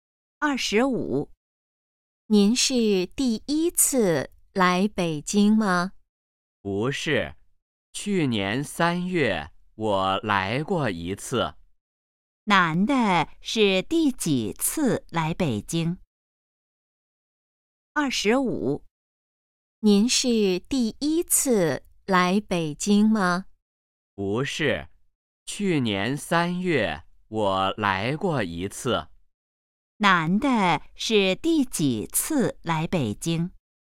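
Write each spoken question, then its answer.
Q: 男的是第几次来北京?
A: 第二次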